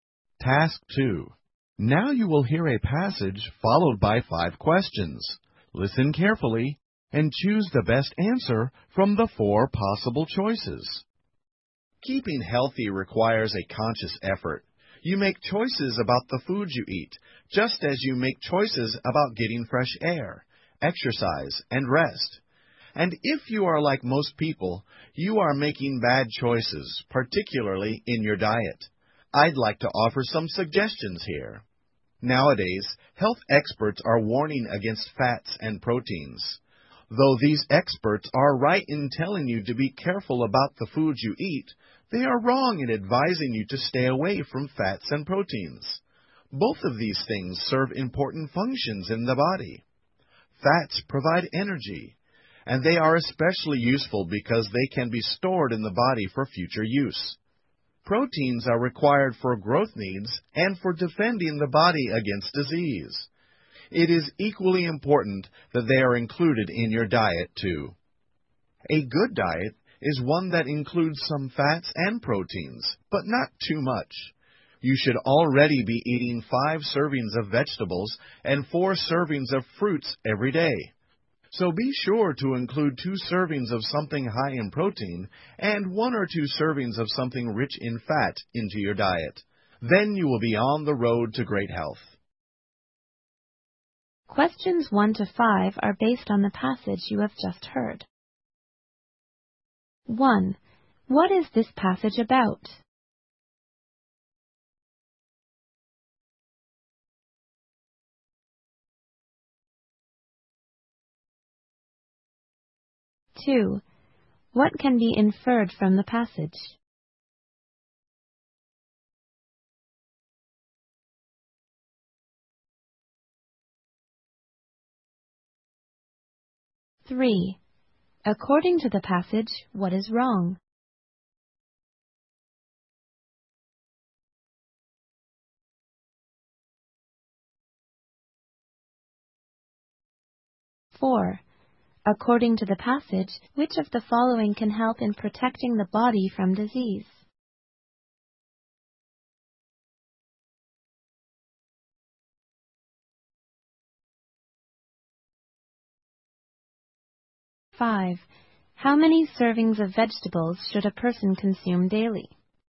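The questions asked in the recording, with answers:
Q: What is this passage about?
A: Including fats and proteins in a healthy diet.

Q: According to the passage, which of the following can help in protecting the body from disease?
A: Proteins.

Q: How many servings of vegetables should a person consume daily?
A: Five.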